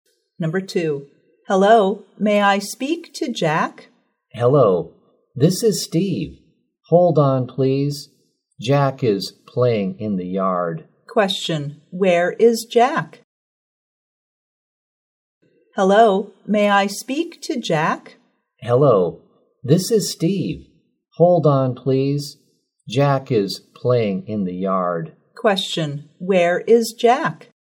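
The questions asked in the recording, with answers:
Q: where is Jack?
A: In the yard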